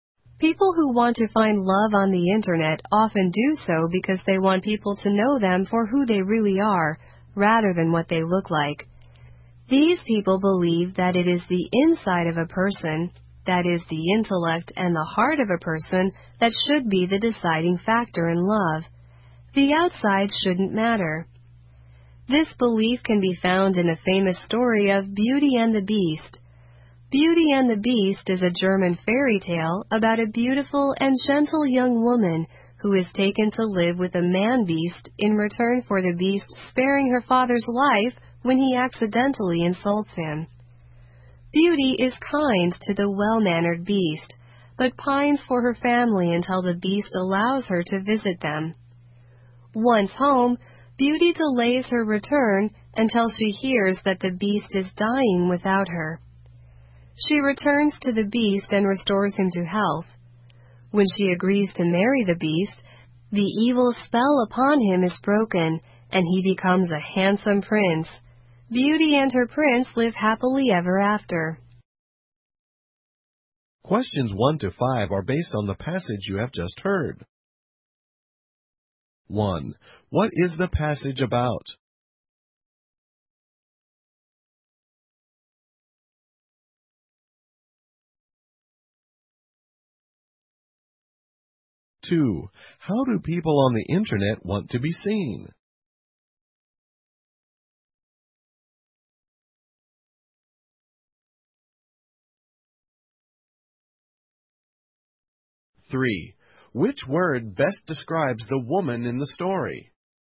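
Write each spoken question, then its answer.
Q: How do people on the internet want to be seen?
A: For who they really are, not for what they look like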